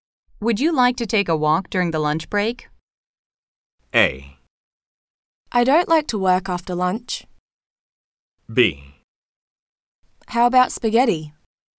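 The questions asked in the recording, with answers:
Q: Would you like to take a walk during the lunch break?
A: C: Sounds great.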